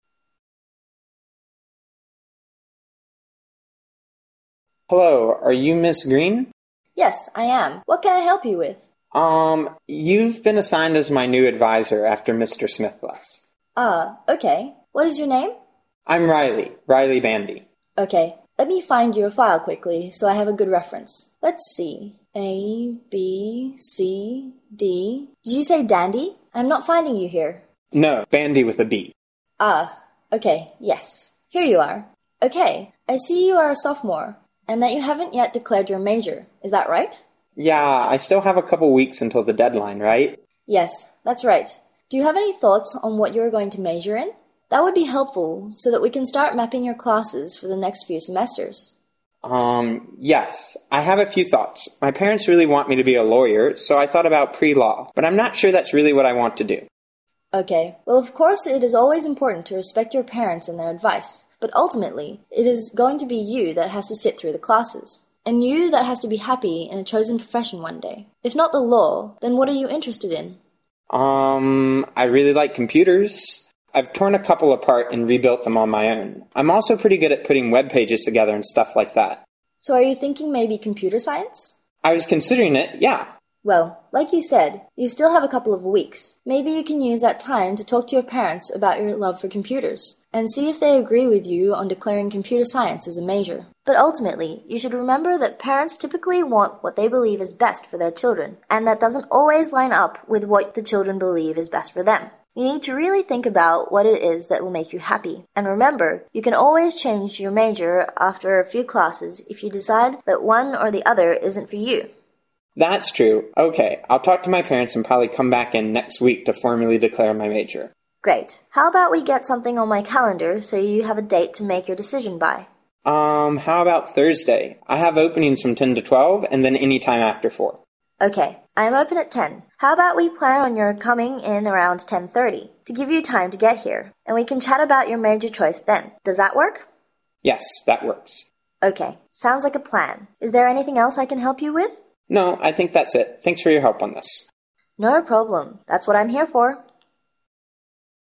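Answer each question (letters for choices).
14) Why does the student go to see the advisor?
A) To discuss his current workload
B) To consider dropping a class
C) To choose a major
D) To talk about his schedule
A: C

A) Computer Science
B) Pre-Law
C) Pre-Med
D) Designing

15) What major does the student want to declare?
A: A

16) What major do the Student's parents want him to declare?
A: B

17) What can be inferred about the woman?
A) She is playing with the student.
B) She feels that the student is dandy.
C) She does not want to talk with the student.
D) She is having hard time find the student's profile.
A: D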